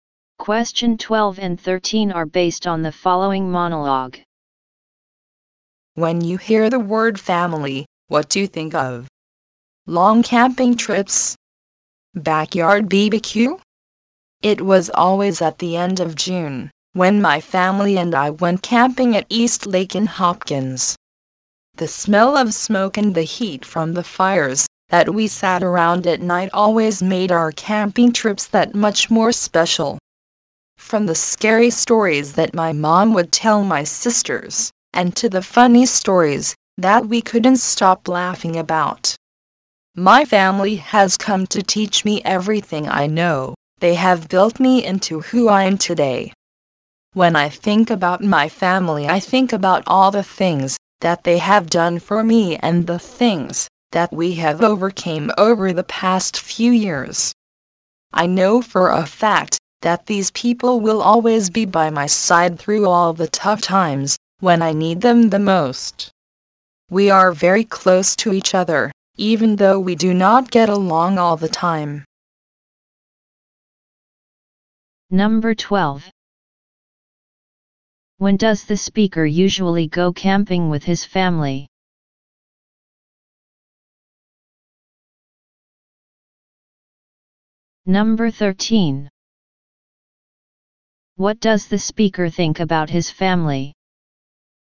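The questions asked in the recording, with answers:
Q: When does the speaker usually go camping with his family?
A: At the end of June

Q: What does the speaker think about his family?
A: They will always be by his side; they are very close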